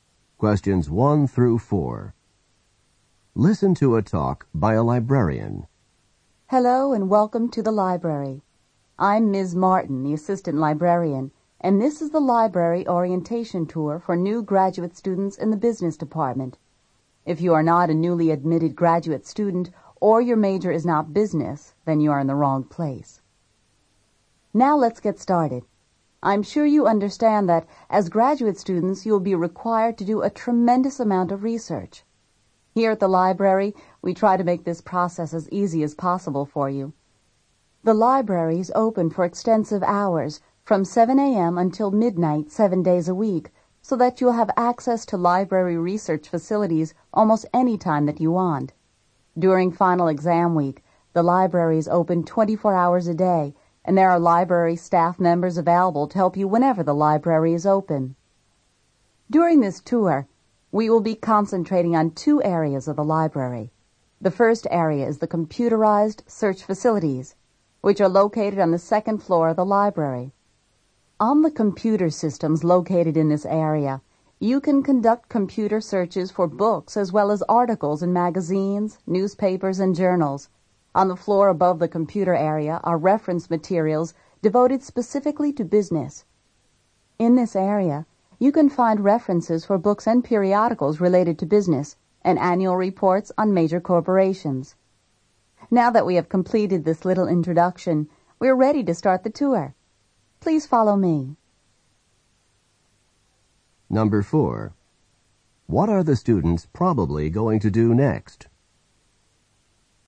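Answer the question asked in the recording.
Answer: Follow the librarian on a tour of the library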